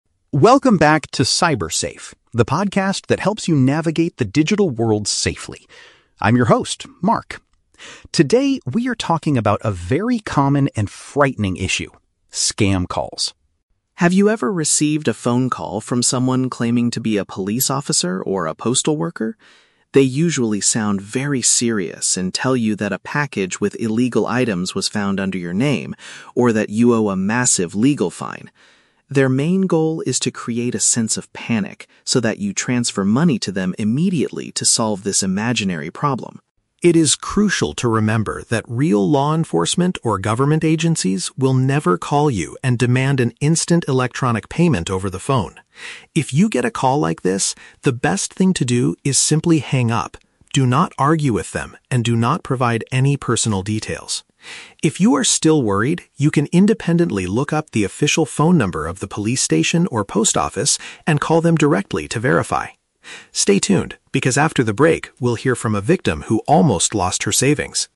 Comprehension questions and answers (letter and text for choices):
Listen to the introduction of a podcast episode and choose the correct answer (A, B, or C) for each question.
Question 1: What is the primary objective of the scammers making these calls?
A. To inform people about a delayed package delivery.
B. To frighten victims into sending them funds.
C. To collect data for a new government survey.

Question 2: According to the host, what is a clear sign that the caller is NOT a real official?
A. They speak in a very quiet and hesitant voice.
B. They refuse to give their badge number or name.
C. They ask for a direct financial transaction during the call.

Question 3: What is the very first action the host recommends if you receive one of these calls?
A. End the phone connection immediately.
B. Tell the caller that you know they are lying.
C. Report the phone number to your mobile provider.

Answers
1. B. To frighten victims into sending them funds.
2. C. They ask for a direct financial transaction during the call.
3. A. End the phone connection immediately.

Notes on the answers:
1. The host states that the scammers' main goal is to "create a sense of panic so that you transfer money." Option B uses the synonyms "frighten victims into sending them funds" to express this idea. Why the traps are wrong: Option A is a trap because the audio mentions a "postal worker" and a "package," but the scammer is not calling about a normal delay; they are lying to get money. Option C is a plausible reason for a phone call, but it is not mentioned in the audio.
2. The host explains that real government agencies will "never call you and demand an instant electronic payment." Therefore, asking for a direct financial transaction is proof they are scammers. Why the traps are wrong: Option A is a trap because the host actually says the scammers "sound very serious," not quiet or hesitant. Option B is a plausible warning sign in real life, but the host never mentions badge numbers or names in this podcast.
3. The host advises that the best thing to do is "simply hang up." Option A paraphrases this as "End the phone connection immediately." Why the traps are wrong: Option B is a trap because the host explicitly warns, "Do not argue with them," which includes telling them you know they are lying. Option C is a logical action, but it is not the advice given in this monologue; the host suggests calling the real police or post office if you are worried.

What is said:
Podcast Host: Welcome back to Cyber Safe, the podcast that helps you navigate the digital world safely. I'm your host, Mark. Today, we are talking about a very common and frightening issue: scam calls.
Have you ever received a phone call from someone claiming to be a police officer or a postal worker? They usually sound very serious and tell you that a package with illegal items was found under your name, or that you owe a massive legal fine. Their main goal is to create a sense of panic so that you transfer money to them immediately to solve this imaginary problem.
It is crucial to remember that real law enforcement or government agencies will never call you and demand an instant electronic payment over the phone. If you get a call like this, the best thing to do is simply hang up. Do not argue with them, and do not provide any personal details. If you are still worried, you can independently look up the official phone number of the police station or post office and call them directly to verify.